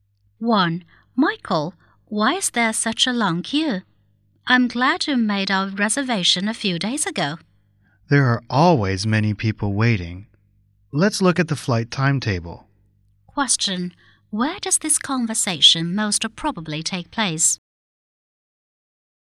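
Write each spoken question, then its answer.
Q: Where does this conversation most probably take place?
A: At an airport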